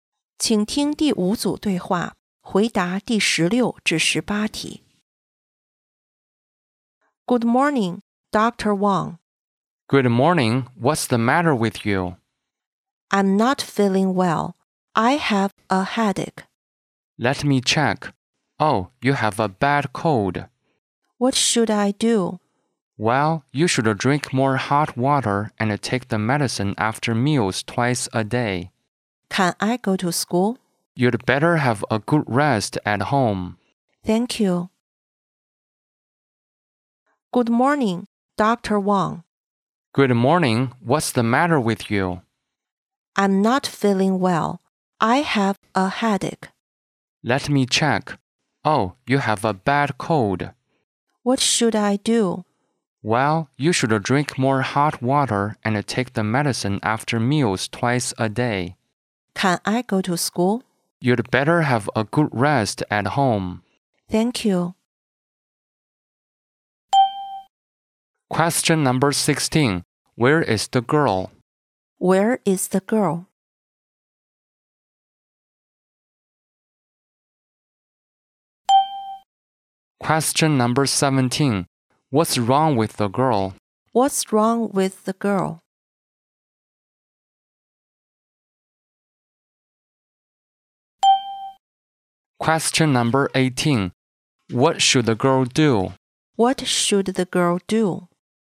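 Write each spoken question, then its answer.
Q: What's wrong with the girl?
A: She has a bad cold (a headache).

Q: What should the girl do?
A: Drink more hot water, take the medicine and rest at home.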